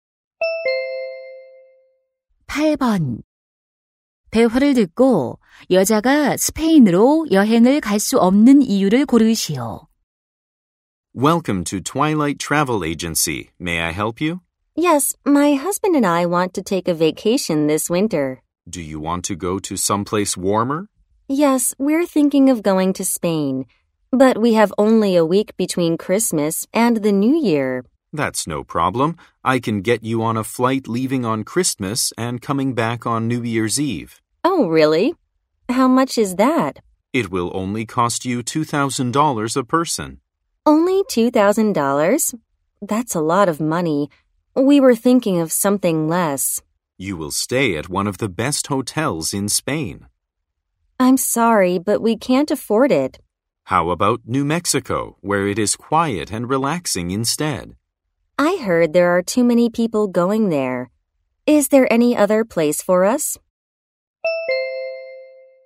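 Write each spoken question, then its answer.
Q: 대화를 듣고 여자가 스페인으로 여행을 갈 수 없는 이유를 고르시오.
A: 비용이 너무 비싸서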